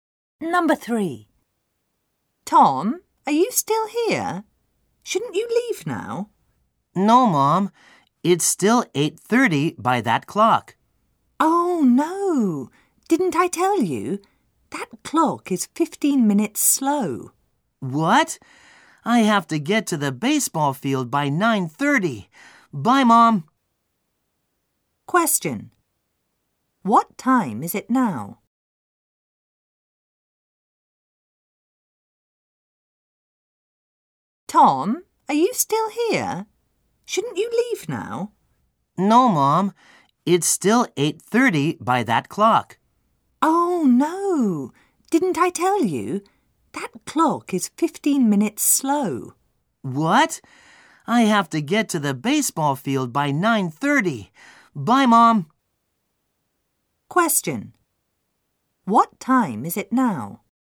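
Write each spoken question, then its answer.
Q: What time is it now?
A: 8:45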